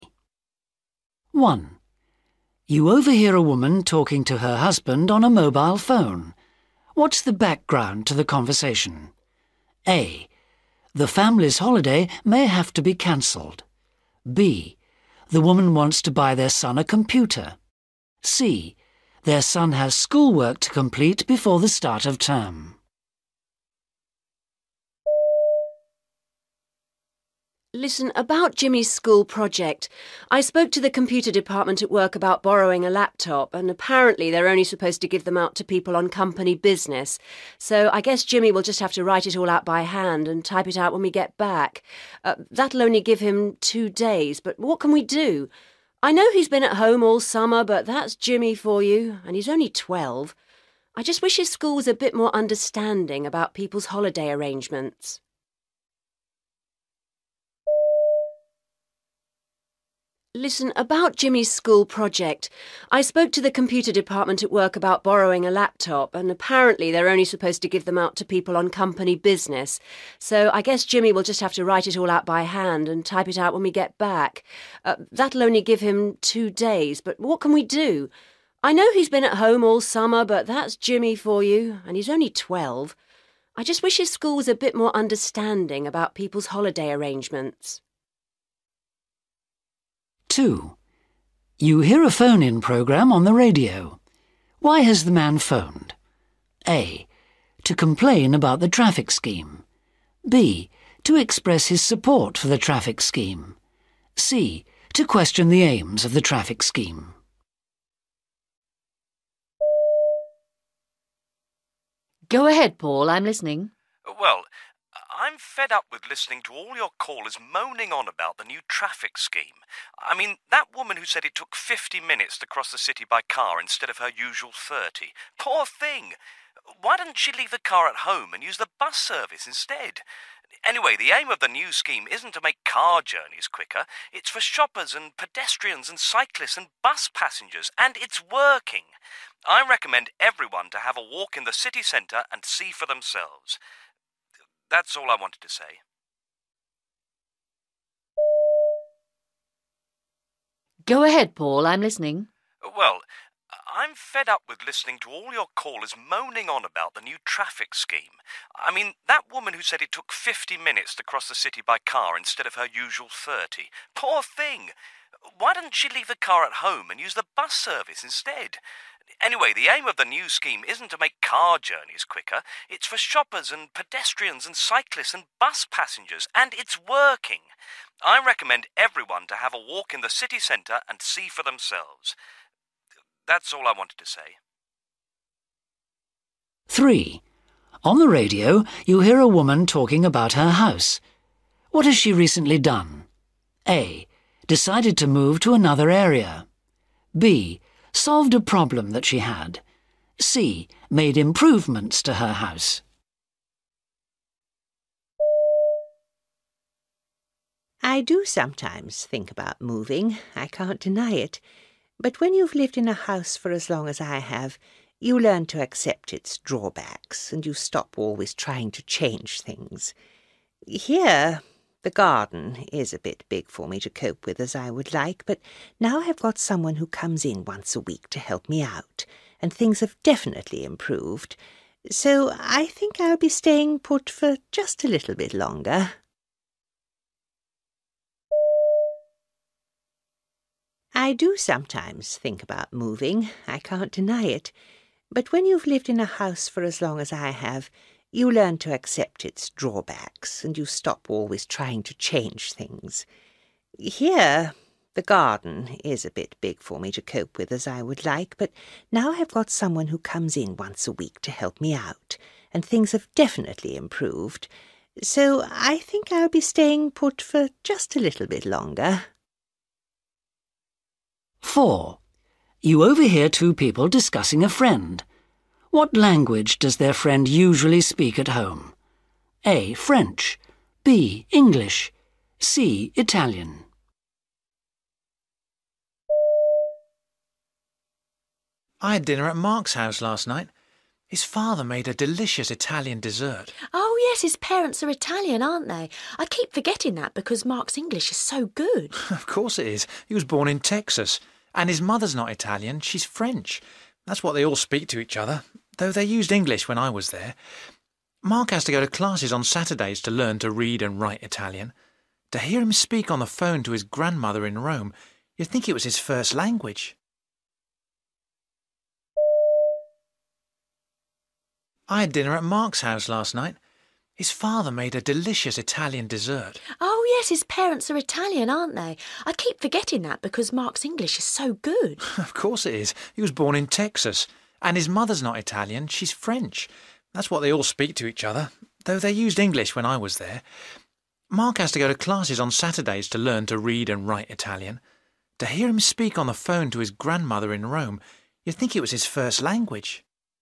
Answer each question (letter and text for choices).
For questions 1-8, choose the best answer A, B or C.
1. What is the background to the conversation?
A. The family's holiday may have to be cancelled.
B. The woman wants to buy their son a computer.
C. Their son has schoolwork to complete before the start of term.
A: C. Their son has schoolwork to complete before the start of term.

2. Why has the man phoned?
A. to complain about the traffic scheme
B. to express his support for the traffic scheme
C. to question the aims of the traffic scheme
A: B. to express his support for the traffic scheme

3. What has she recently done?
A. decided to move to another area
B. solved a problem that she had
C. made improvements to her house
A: B. solved a problem that she had

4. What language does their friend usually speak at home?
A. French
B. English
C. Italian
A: A. French

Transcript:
1
Listen, about Jimmy's school project. I spoke to the computer department at work about borrowing a laptop, and apparently they're only supposed to give them out to people on company business. So I guess Jimmy will just have to write it all out by hand and type it out when we get back. That'll only give him two days, but what can we do? I know he's been at home all summer, but that's Jimmy for you, and he's only twelve. I just wish his school was a bit more understanding about people's holiday arrangements.
2
Woman: Go ahead, Paul, I'm listening.
Man: Well ... I'm fed up with listening to all your callers moaning on about the new traffic scheme. I mean, that woman who said it took fifty minutes to cross the city by car instead of her usual thirty. Poor thing! Why doesn't she leave the car at home and use the bus service instead? Anyway, the aim of the new scheme isn't to make car journeys quicker; it's for shoppers and pedestrians and cyclists and bus passengers, and it's working. I recommend everyone to have a walk in the city centre and see for themselves. That's all I wanted to say.
3
I do sometimes think about moving, I can't deny it, but when you've lived in a house for as long as I have, you learn to accept its drawbacks and you stop always trying to change things. Here, the garden is a bit big for me to cope with as I would like, but now I've got someone who comes in once a week to help me out, and things have definitely improved, so I think I'll be staying put for just a little bit longer.
4
Man: I had dinner at Mark's house last night. His father made a delicious Italian dessert.
Woman: Oh, yes, his parents are Italian, aren't they? I keep forgetting that because Mark's English is so good.
Man: Of course it is! He was born in Texas. And his mother's not Italian, she's French. That's what they all speak to each other, though they used English when I was there. Mark has to go to classes on Saturday to learn to read and write Italian. To hear him speak on the phone to his grandmother in Rome, you'd think it was his first language!
5